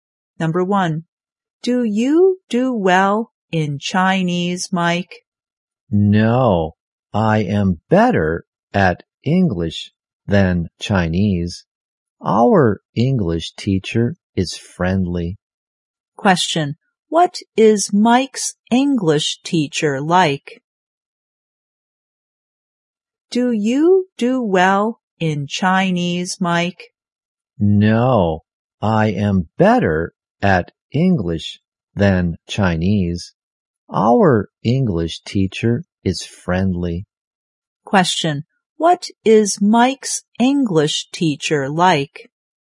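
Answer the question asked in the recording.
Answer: Friendly.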